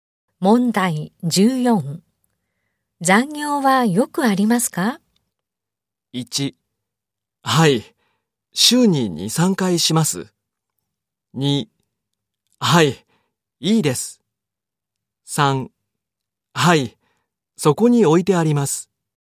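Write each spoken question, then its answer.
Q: 残業はよくありますか?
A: 1: はい。週に2、3回します。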